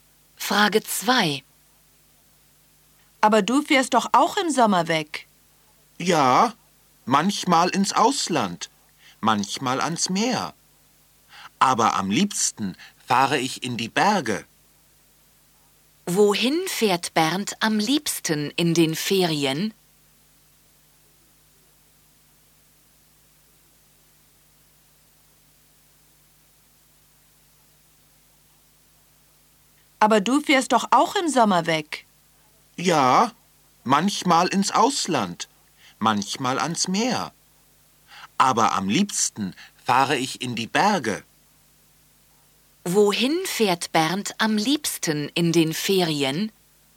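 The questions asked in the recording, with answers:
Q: Wohin fährt Bernd am liebsten in den Ferien?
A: In die Berge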